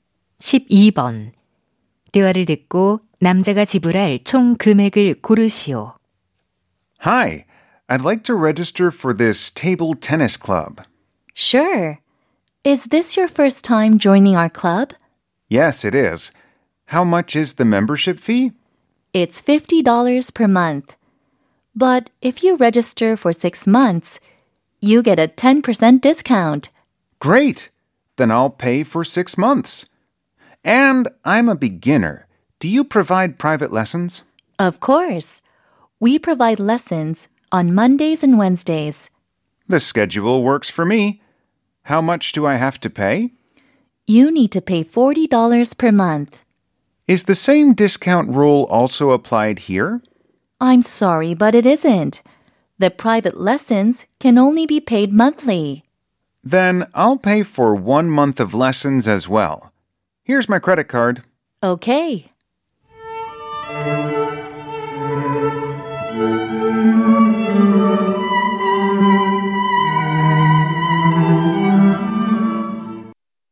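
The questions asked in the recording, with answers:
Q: 대화를 듣고 남자가 지불할 총 금액을 고르시오.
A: $310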